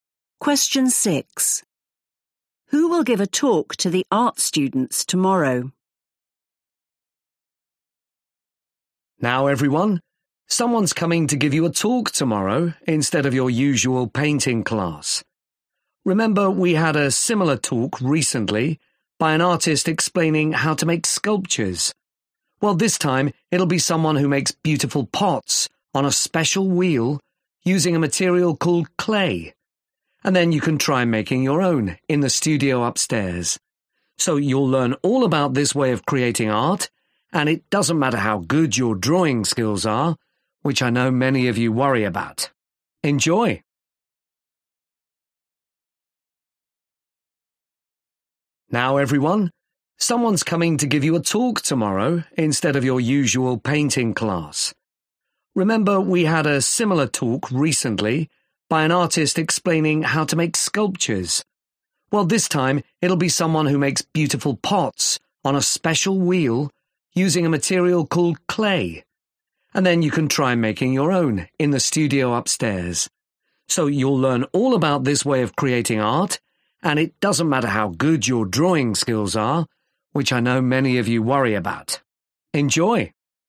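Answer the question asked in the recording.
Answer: someone who makes pots from clay (a potter)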